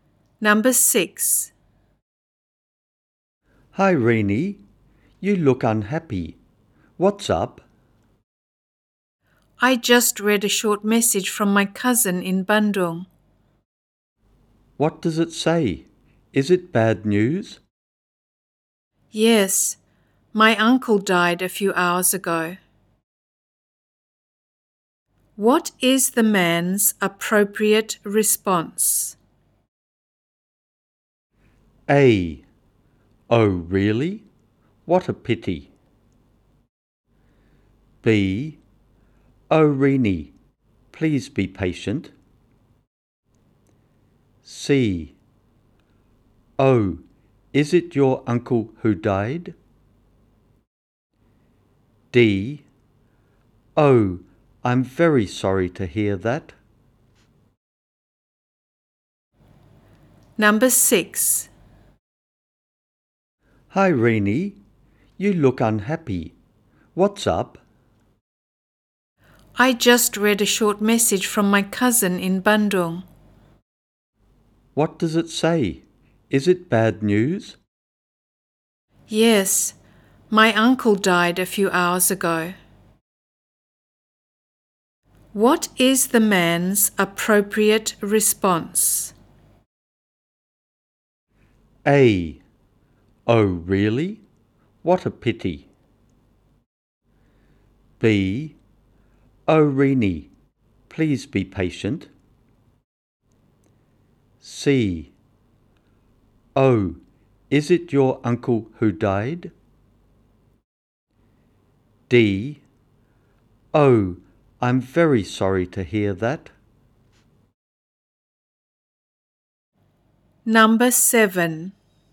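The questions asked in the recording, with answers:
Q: What is the man's appropriate response?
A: D: Oh, I'm very sorry to hear that.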